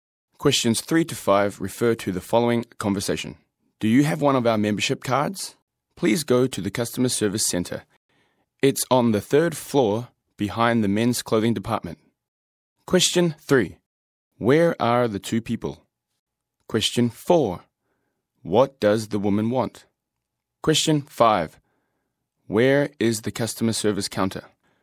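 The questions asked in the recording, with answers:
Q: Where is the customer service counter?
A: On the third floor, behind the men's clothing department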